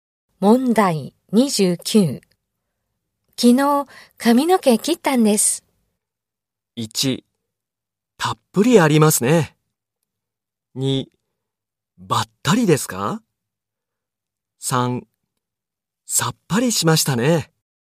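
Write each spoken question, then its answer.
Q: 昨日、髪の毛切ったんです。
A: 3: さっぱりしましたね。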